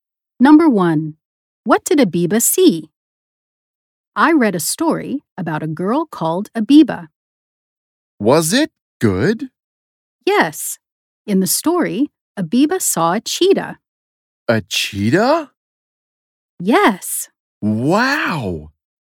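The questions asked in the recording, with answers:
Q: What did Abiba see?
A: a cheetah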